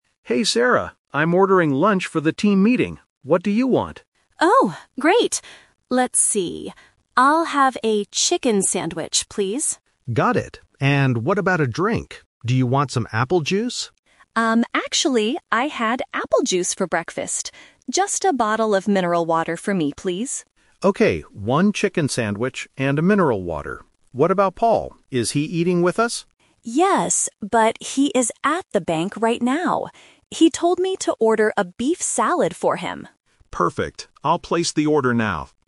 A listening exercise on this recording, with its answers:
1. What is Sarah going to eat?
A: A chicken sandwich

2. What drink does Sarah order?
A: Mineral water

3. Where is Paul right now?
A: At the bank

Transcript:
David: Hey Sarah, I'm ordering lunch for the team meeting. What do you want?
Sarah: Oh, great. Let's see... I'll have a chicken sandwich, please.
David: Got it. And what about a drink? Do you want some apple juice?
Sarah: Um, actually, I had apple juice for breakfast. Just a bottle of mineral water for me, please.
David: Okay, one chicken sandwich and a mineral water. What about Paul? Is he eating with us?
Sarah: Yes, but he is at the bank right now. He told me to order a beef salad for him.